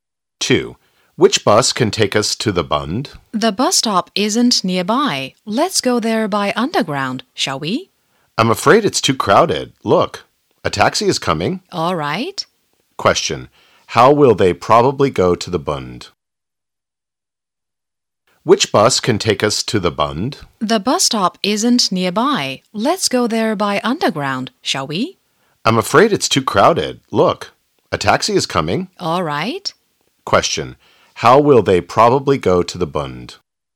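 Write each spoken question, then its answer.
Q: How will they probably go to the Bund?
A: By taxi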